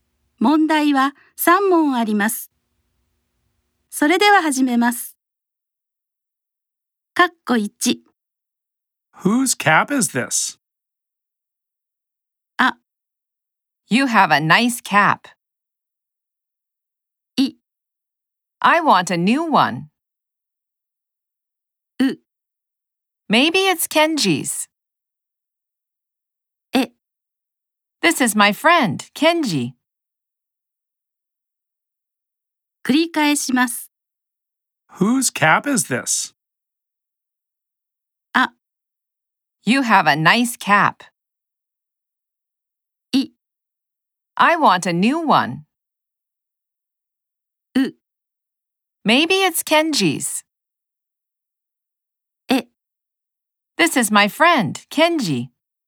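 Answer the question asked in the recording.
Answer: う: Maybe it's Kenji's.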